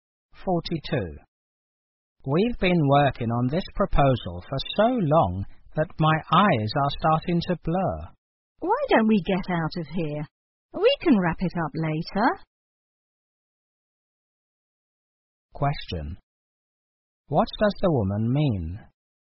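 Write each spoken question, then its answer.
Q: What does the woman mean?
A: They should stop working and finish the proposal later.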